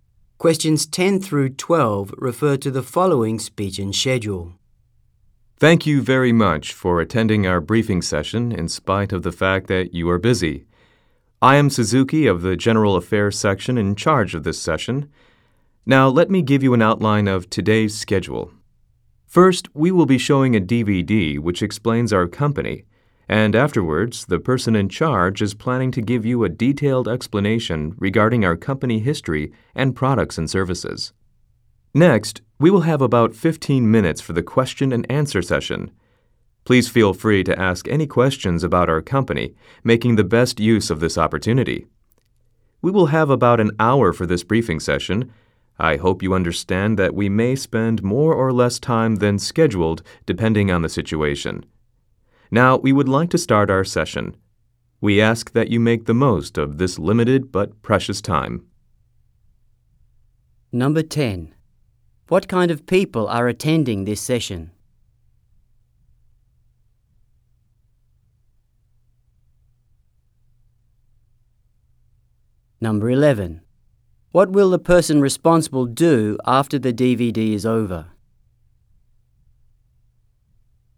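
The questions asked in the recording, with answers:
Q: What will the person responsible do after the DVD is over?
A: Give a detailed explanation of the company's history, products and services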